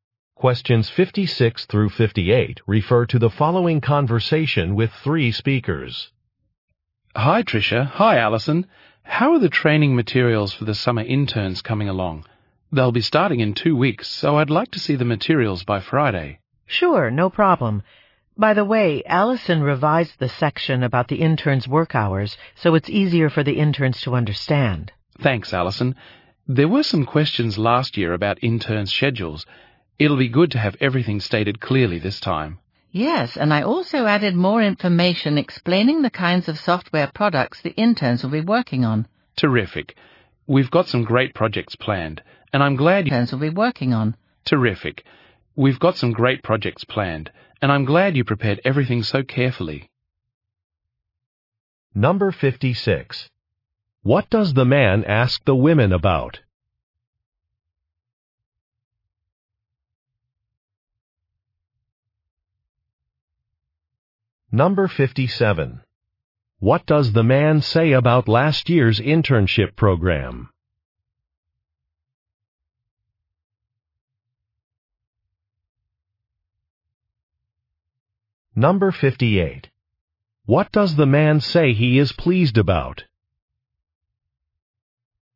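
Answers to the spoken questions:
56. The training materials for summer interns
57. There were questions about interns' schedules
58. They prepared everything carefully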